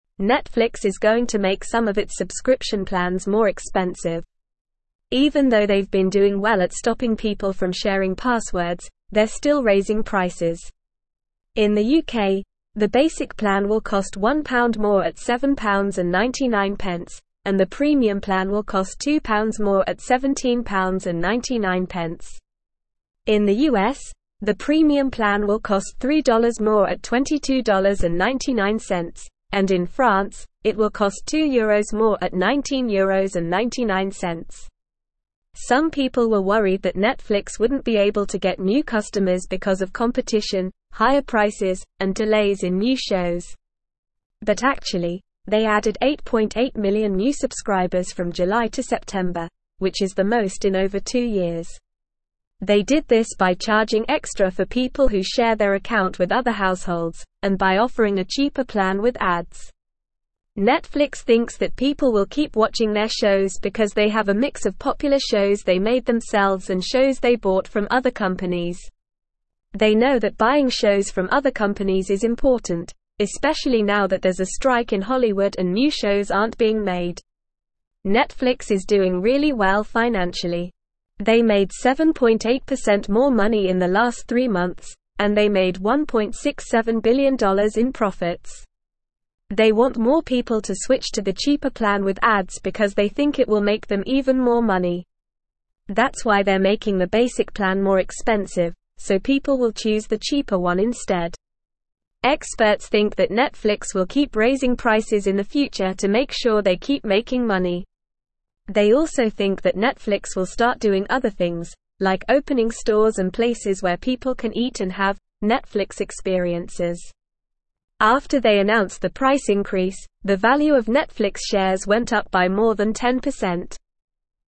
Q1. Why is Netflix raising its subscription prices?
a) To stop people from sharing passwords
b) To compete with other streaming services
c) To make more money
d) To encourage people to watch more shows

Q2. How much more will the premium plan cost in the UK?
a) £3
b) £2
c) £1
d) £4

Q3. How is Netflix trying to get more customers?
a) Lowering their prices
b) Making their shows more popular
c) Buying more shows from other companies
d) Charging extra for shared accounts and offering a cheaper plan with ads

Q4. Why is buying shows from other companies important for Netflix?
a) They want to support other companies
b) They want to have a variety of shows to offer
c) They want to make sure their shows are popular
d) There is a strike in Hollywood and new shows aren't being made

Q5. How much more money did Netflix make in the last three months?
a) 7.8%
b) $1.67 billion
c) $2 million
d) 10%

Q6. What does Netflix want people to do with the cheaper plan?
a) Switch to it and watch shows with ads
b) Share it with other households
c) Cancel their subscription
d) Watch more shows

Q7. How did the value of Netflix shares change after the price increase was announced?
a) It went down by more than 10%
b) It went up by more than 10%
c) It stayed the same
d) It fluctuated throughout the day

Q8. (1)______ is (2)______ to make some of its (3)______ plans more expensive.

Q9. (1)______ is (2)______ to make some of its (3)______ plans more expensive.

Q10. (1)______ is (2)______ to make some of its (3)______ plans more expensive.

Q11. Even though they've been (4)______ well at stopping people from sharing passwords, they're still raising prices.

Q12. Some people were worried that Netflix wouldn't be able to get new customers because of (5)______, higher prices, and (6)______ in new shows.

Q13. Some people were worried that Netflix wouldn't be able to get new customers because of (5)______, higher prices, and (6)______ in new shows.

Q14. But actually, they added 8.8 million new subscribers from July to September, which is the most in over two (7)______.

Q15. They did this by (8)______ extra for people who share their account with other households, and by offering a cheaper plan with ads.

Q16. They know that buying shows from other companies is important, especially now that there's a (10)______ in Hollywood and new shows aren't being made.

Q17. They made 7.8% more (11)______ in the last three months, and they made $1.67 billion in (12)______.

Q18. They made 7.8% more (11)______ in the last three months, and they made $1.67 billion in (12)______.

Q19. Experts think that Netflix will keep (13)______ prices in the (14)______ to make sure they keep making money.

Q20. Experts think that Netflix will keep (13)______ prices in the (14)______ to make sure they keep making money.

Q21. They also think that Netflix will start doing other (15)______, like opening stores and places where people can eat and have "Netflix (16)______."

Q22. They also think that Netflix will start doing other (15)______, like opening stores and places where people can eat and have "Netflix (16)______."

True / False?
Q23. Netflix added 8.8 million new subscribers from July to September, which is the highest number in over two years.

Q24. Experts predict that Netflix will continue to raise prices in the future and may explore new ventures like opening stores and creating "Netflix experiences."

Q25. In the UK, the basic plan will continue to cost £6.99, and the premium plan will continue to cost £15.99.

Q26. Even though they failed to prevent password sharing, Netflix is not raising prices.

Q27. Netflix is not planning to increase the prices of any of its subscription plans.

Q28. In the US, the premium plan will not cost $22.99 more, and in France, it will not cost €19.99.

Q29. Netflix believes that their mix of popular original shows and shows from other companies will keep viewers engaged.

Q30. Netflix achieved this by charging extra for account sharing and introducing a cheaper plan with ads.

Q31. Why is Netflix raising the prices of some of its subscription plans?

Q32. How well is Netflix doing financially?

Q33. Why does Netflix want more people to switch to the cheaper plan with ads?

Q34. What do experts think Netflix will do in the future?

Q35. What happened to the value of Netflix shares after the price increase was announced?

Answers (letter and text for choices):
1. c) To make more money
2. b) £2
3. d) Charging extra for shared accounts and offering a cheaper plan with ads
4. d) There is a strike in Hollywood and new shows aren't being made
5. a) 7.8%
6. a) Switch to it and watch shows with ads
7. b) It went up by more than 10%
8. Netflix
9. going
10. subscription
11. doing
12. competition
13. delays
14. years
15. charging
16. strike
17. money
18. profits
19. raising
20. future
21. things
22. experiences
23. True
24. True
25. False
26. False
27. False
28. False
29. True
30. True
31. Netflix is raising the prices of some of its subscription plans to make more money and ensure their financial success.
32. Netflix is doing well financially. They made 7.8% more money in the last three months and made $1.67 billion in profits.
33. Netflix wants more people to switch to the cheaper plan with ads because they believe it will generate even more money for them.
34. Experts think Netflix will continue to raise prices to ensure their financial success. They also believe Netflix may start opening stores and places where people can have "Netflix experiences."
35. After the price increase was announced, the value of Netflix shares went up by more than 10%.

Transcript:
Netflix is going to make some of its subscription plans more expensive. Even though they've been doing well at stopping people from sharing passwords, they're still raising prices. In the UK, the basic plan will cost £1 more at £7.99, and the premium plan will cost £2 more at £17.99. In the US, the premium plan will cost $3 more at $22.99, and in France, it will cost €2 more at €19.99.
Some people were worried that Netflix wouldn't be able to get new customers because of competition, higher prices, and delays in new shows. But actually, they added 8.8 million new subscribers from July to September, which is the most in over two years. They did this by charging extra for people who share their account with other households, and by offering a cheaper plan with ads.
Netflix thinks that people will keep watching their shows because they have a mix of popular shows they made themselves and shows they bought from other companies. They know that buying shows from other companies is important, especially now that there's a strike in Hollywood and new shows aren't being made.
Netflix is doing really well financially. They made 7.8% more money in the last three months, and they made $1.67 billion in profits. They want more people to switch to the cheaper plan with ads because they think it will make them even more money. That's why they're making the basic plan more expensive, so people will choose the cheaper one instead.
Experts think that Netflix will keep raising prices in the future to make sure they keep making money. They also think that Netflix will start doing other things, like opening stores and places where people can eat and have "Netflix experiences." After they announced the price increase, the value of Netflix shares went up by more than 10%.

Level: Level 3